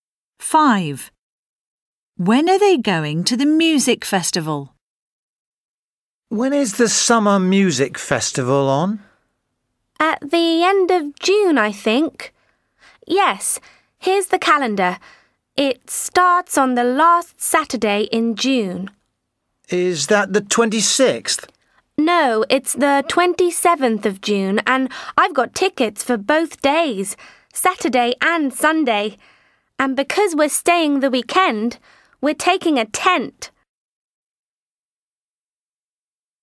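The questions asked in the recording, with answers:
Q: When are they going to the music festival?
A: On 27th June, for the weekend (Saturday and Sunday)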